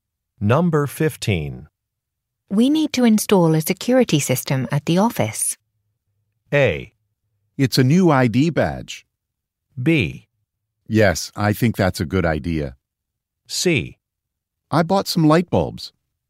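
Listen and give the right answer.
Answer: B: Yes, I think that's a good idea.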